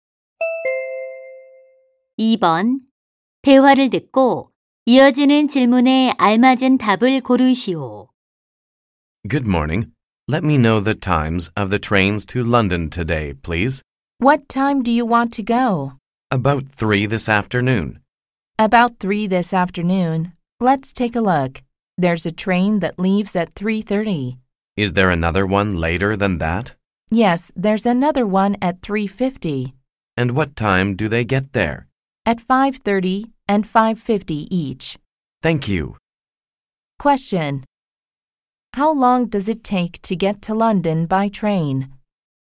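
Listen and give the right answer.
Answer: 2 hours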